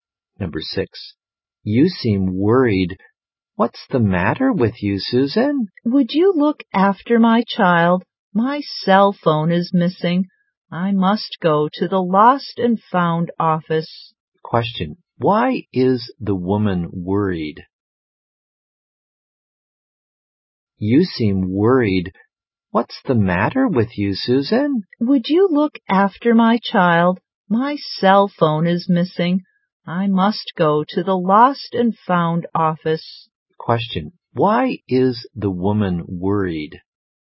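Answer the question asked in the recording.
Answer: Her cell phone is missing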